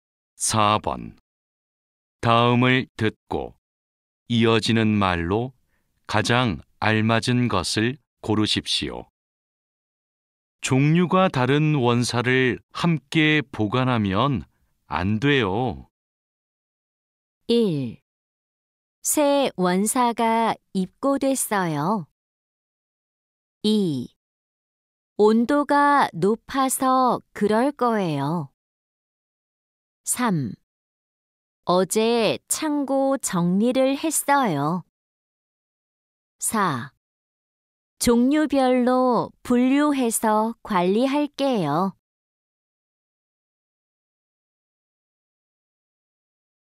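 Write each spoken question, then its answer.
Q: 종류가 다른 원사를 함께 보관하면 안 돼요.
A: 4: 종류별로 분류해서 관리할게요.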